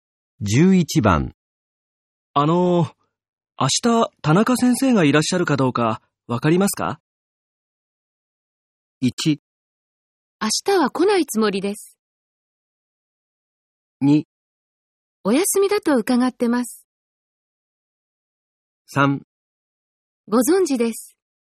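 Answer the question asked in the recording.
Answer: 2: お休みだと伺ってます。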